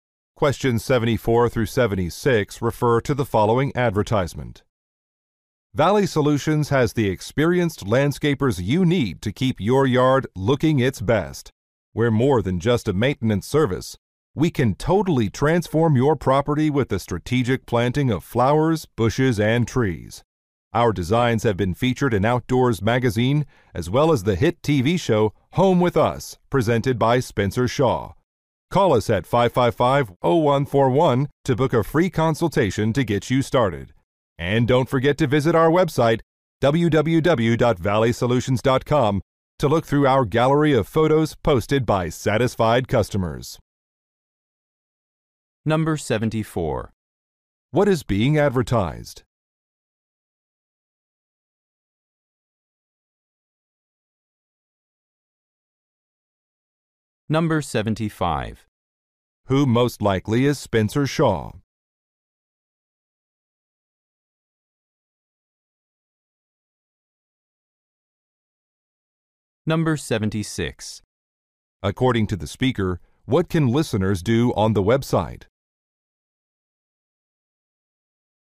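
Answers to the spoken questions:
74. A landscaping service
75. A TV show host
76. Look at customers' photos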